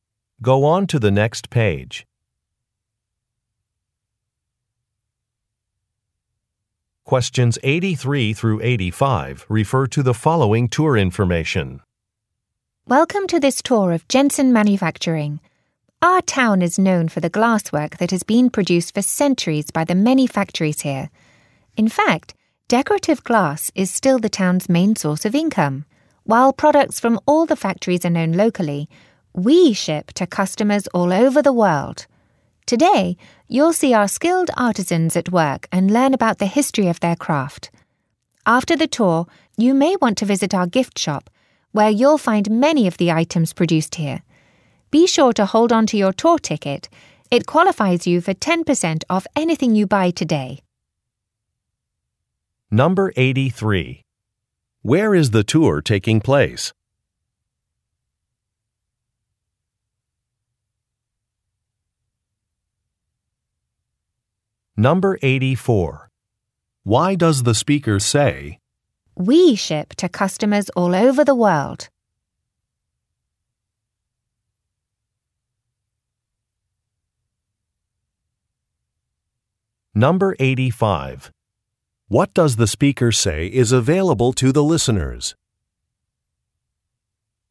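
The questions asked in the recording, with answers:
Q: Where is the tour taking place?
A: At a glass factory

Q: What does the speaker say is available to the listeners?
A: A 10% discount at the gift shop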